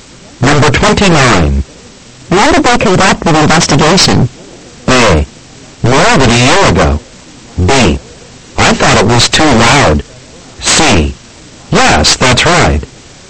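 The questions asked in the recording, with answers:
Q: When did they conduct the investigation?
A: A: More than a year ago.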